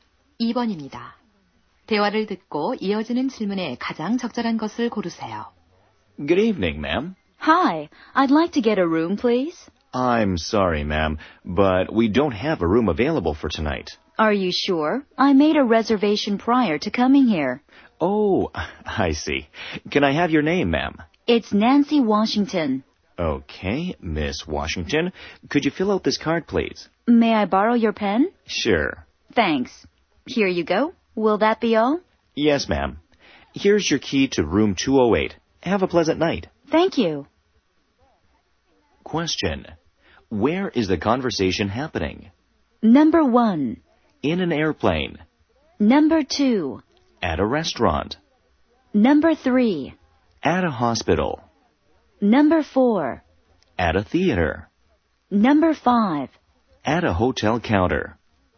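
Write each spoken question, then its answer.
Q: Where is the conversation happening?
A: 5: At a hotel counter.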